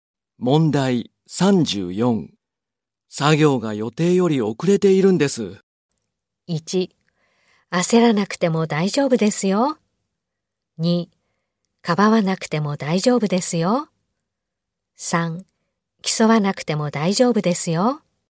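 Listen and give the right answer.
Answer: 1: 焦らなくても大丈夫ですよ。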